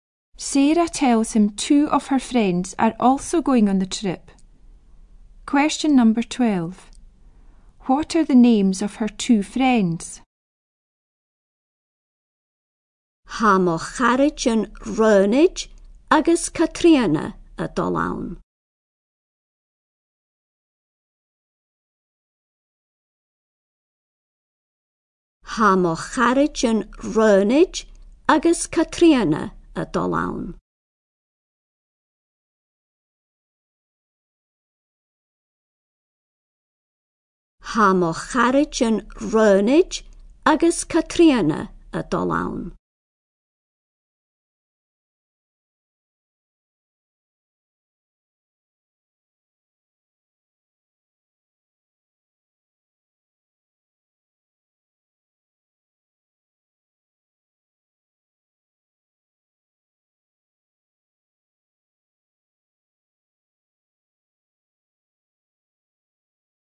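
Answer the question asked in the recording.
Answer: Ronag and Catriona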